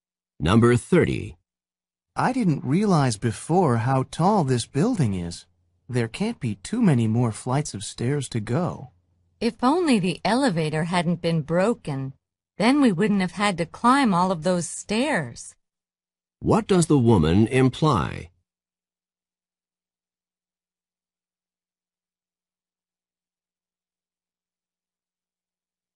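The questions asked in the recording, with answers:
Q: What does the woman imply?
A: The elevator was broken, so they had to climb the stairs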